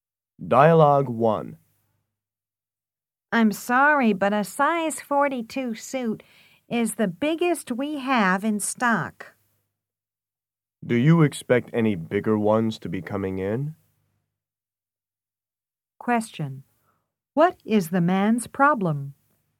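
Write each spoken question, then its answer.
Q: What is the man's problem?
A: He needs a suit bigger than size 42, which the shop doesn't have in stock.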